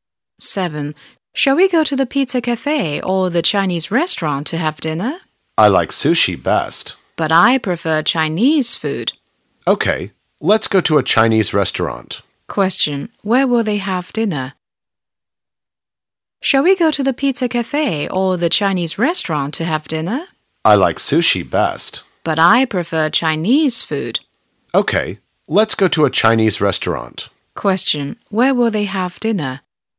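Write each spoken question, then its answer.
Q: Where will they have dinner?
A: At a Chinese restaurant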